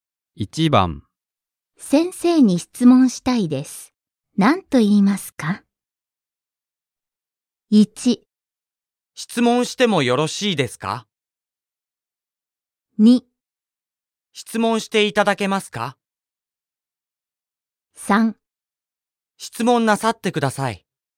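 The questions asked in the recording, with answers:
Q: 先生に質問したいです。何と言いますか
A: 1: 質問してもよろしいですか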